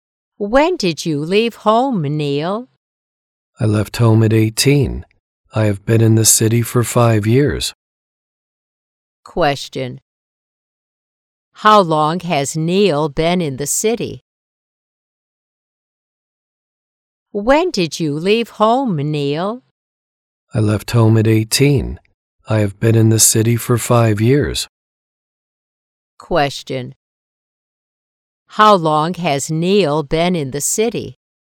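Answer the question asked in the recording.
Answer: For 5 years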